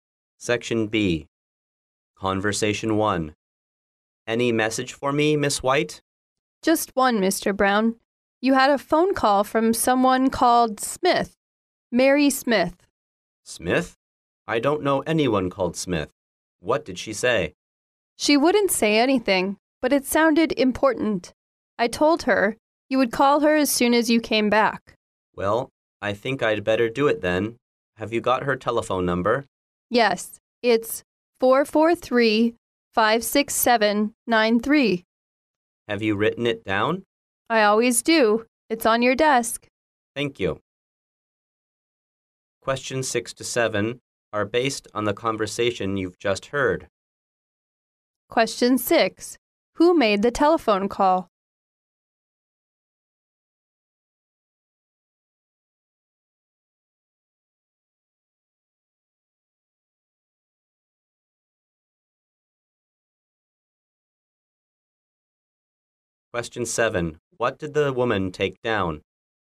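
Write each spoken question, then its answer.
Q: Who made the telephone call?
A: Mary Smith

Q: What did the woman take down?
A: Mary Smith's telephone number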